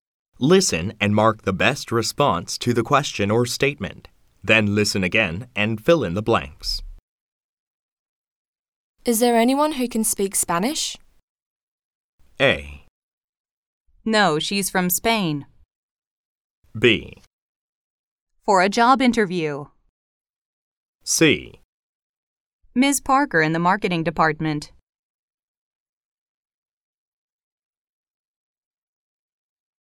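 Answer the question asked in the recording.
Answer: C: Ms. Parker in the marketing department.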